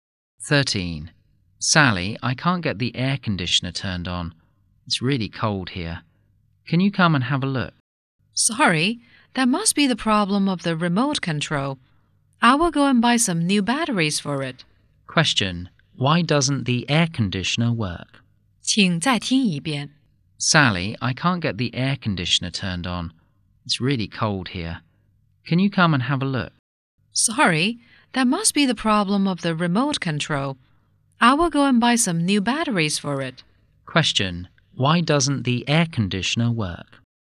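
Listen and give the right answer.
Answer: The remote control's batteries are dead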